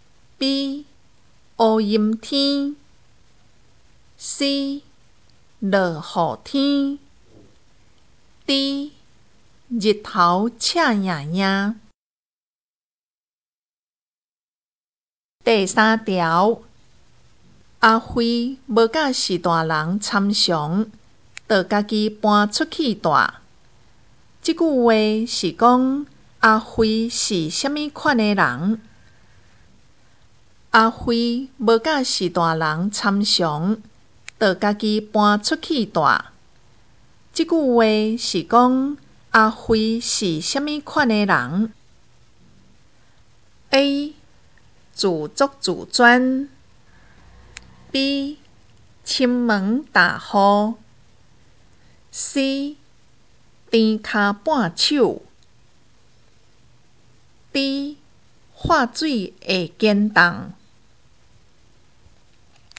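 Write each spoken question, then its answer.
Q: 即句话是讲阿飞是虾米款的人?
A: A: 自作自专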